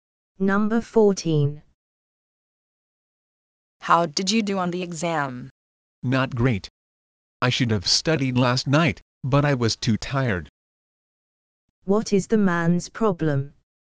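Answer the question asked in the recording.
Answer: He didn't do well on the exam because he was too tired to study.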